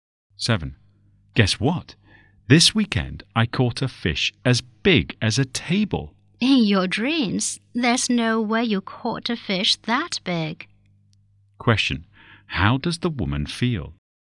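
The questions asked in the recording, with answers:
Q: How does the woman feel?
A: She doesn't believe him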